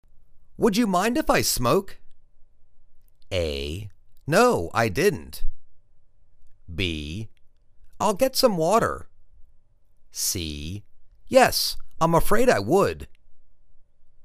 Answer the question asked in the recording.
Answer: Yes, I'm afraid I would.